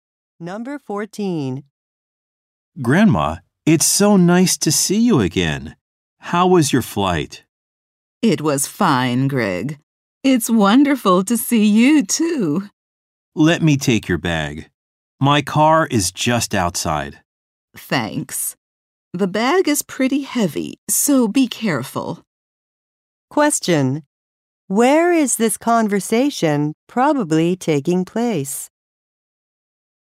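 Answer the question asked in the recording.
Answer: At an airport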